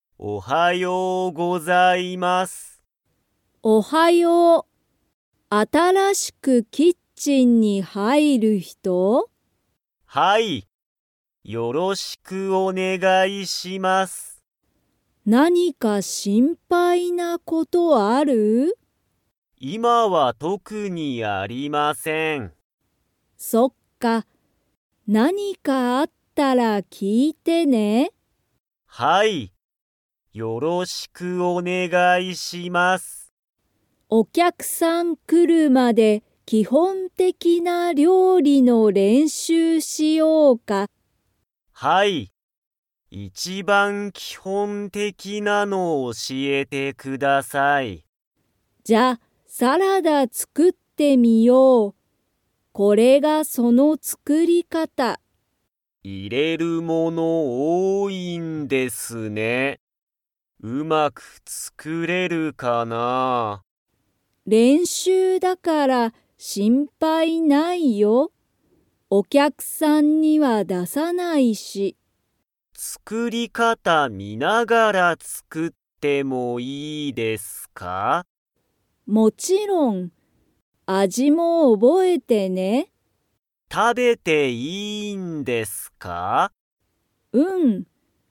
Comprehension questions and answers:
Comprehension Quiz (Skip if you don't understand the conversation yet)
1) ゆうとは、今いまから何なにを作つくりますか?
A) サラダ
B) パスタ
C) ラーメン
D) キッチン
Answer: A) サラダ

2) ゆうとは、作つくり方かたを 作つくる。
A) 見みながら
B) 見みないで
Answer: A) 見みながら

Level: Level 3

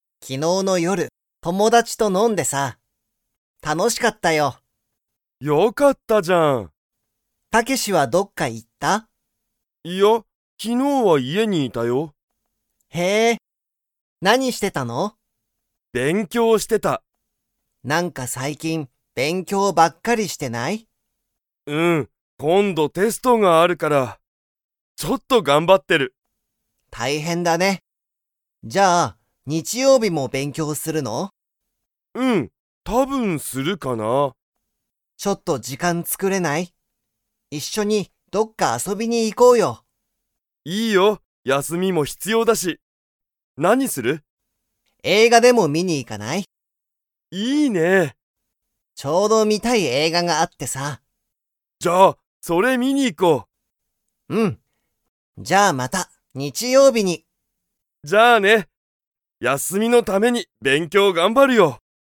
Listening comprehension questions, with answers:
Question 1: 昨日(きのう)の夜(よる)、タケシも飲(の)みましたか?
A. はい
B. いいえ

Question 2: ヒロシとタケシは、日曜日(にちようび)に____。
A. 友達(ともだち)と飲(の)む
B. 一緒(いっしょ)に勉強(べんきょう)する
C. 家(いえ)にいる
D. 映画(えいが)を観(み)に行(い)く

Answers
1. B. いいえ
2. D. 映画(えいが)を観(み)に行(い)く

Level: Level 2

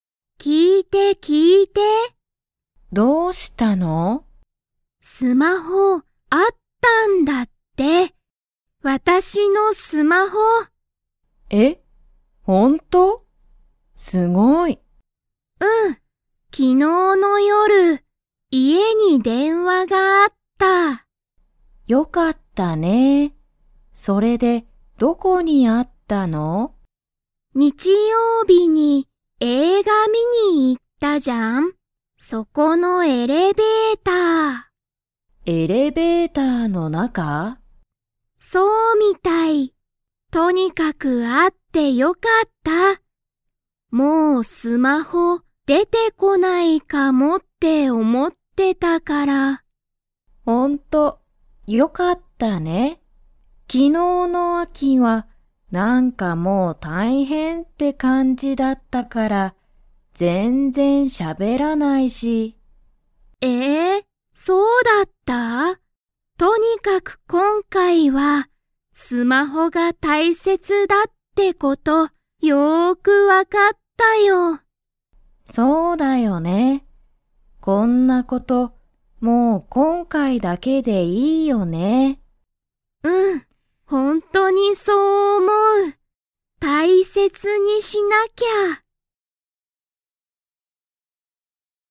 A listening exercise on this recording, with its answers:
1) いつ電話(でんわ)がありましたか?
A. 昨日(きのう)の夜(よる)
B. 日曜日(にちようび)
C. 今日(きょう)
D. この前(まえ)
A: A. 昨日(きのう)の夜(よる)

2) アキは、スマホが_____だとわかった。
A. 大変(たいへん)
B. 大切(たいせつ)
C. 普通(ふつう)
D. いろいろ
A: B. 大切(たいせつ)

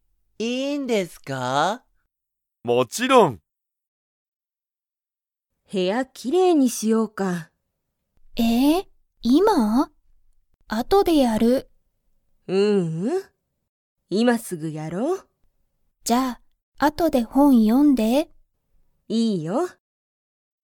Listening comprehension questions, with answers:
Comprehension Quiz (Skip if you don't understand the conversation yet)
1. マキは、今(いま)すぐ本(ほん)を読(よ)みますか?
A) はい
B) いいえ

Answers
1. B) いいえ

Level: Level 1

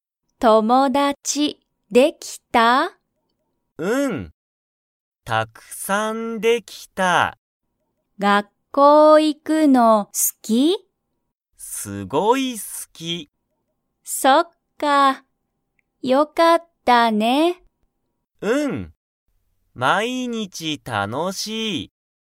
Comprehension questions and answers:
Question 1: ヒロキは____に行(い)くのが好(す)きだ。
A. 友達(ともだち)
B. 学校(がっこう)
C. ご飯(はん)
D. 毎日(まいにち)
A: B. 学校(がっこう)

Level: Level 1

